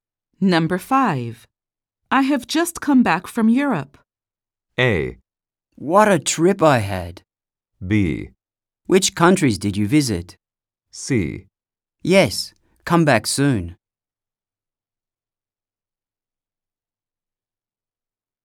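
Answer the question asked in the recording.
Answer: B: Which countries did you visit?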